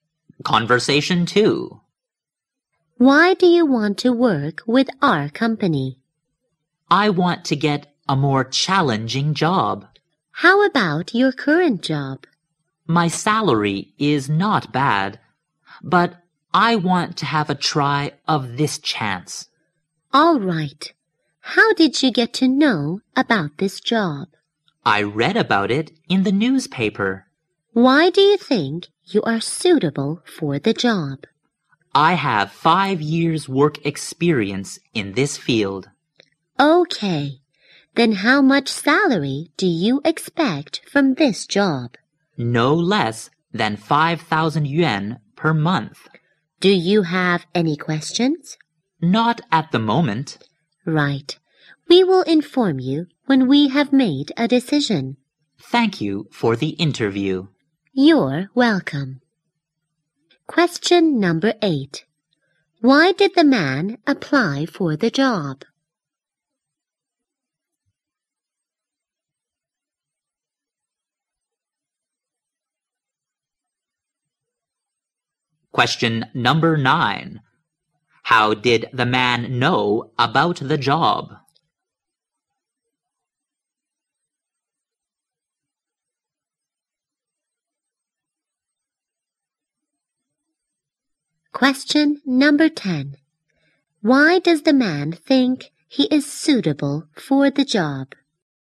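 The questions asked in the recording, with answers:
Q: Why did the man apply for the job?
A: To get a more challenging job

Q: How did the man know about the job?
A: From the newspaper

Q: Why does the man think he is suitable for the job?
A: He has 5 years' work experience in this field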